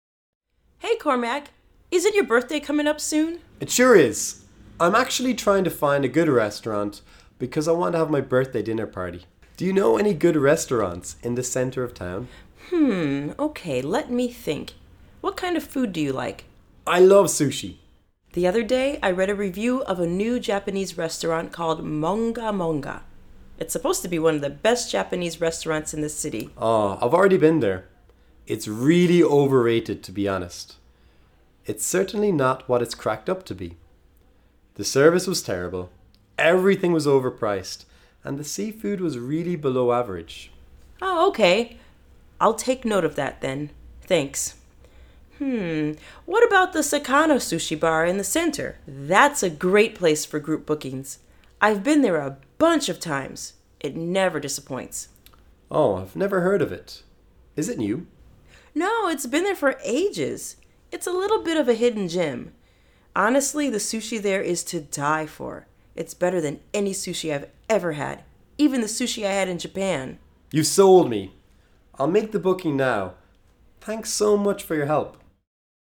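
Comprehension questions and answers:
Where was the best sushi Sina has ever eaten? Listen and choose the correct sentence.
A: At the Sakano Sushi Bar in the center of town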